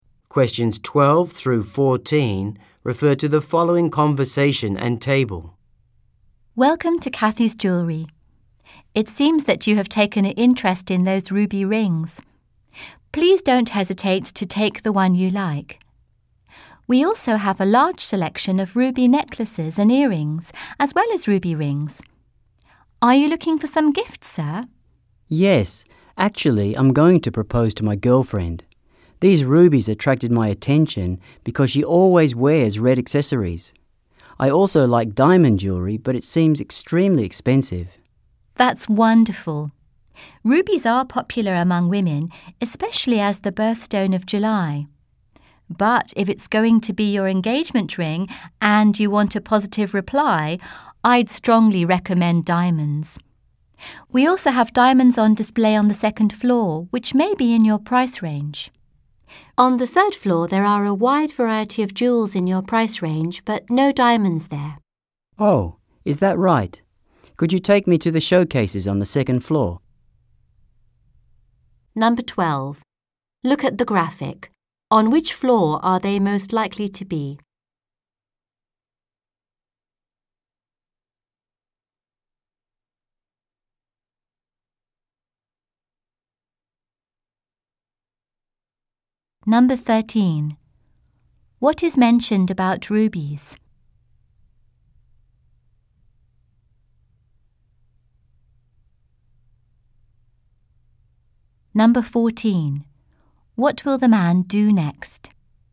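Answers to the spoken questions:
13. They are popular among women as the birthstone of July.
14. Go to the second floor to look at diamonds.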